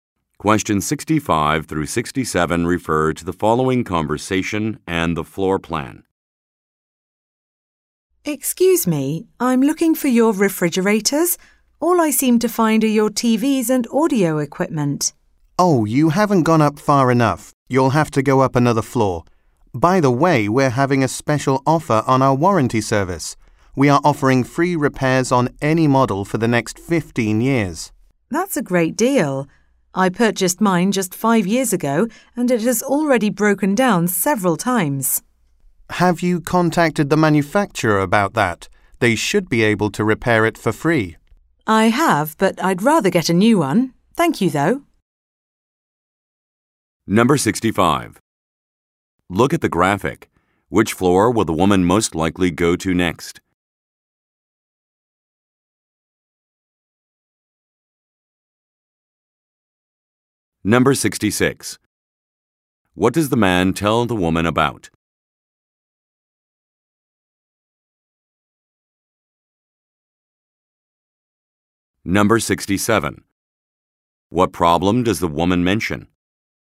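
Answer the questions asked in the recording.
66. A special offer on warranty service (free repairs for 15 years)
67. Her refrigerator, bought 5 years ago, has already broken down several times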